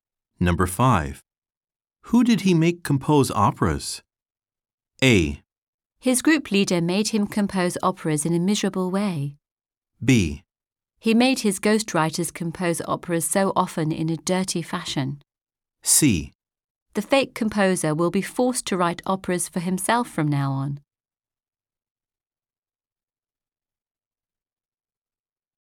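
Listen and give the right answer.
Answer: B: He made his ghostwriters compose operas so often in a dirty fashion.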